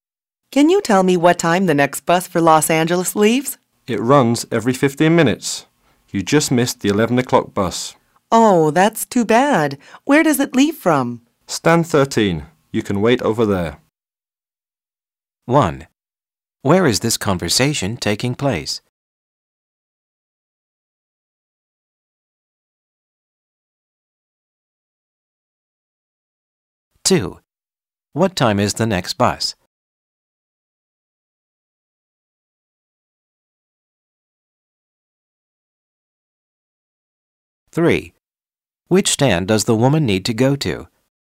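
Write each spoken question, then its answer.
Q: Where is this conversation taking place?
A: At a bus station

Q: What time is the next bus?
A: 11:15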